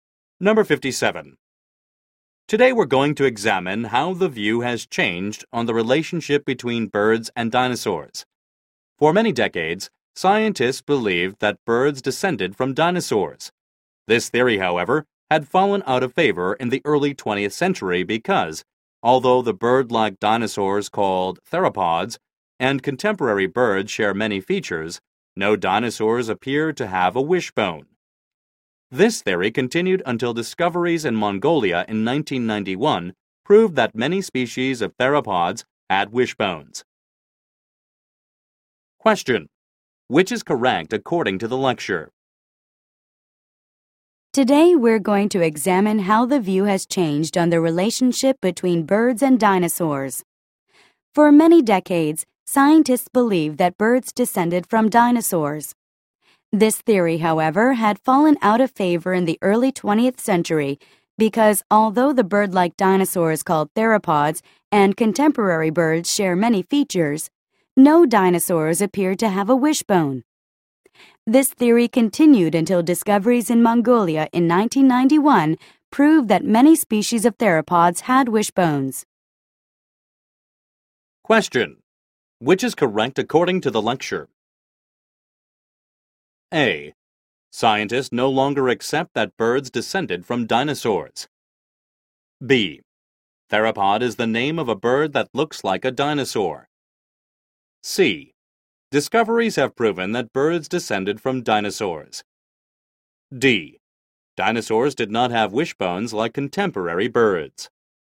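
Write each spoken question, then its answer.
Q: Which is correct according to the lecture?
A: C: Discoveries have proven that birds descended from dinosaurs.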